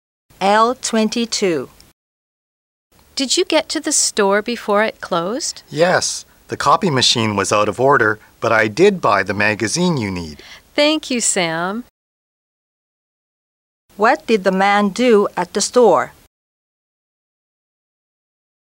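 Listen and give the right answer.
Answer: He bought a magazine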